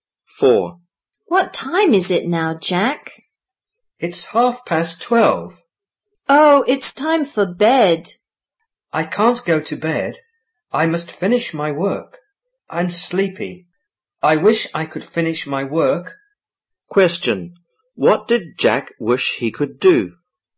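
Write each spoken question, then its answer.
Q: What did Jack wish he could do?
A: Finish his work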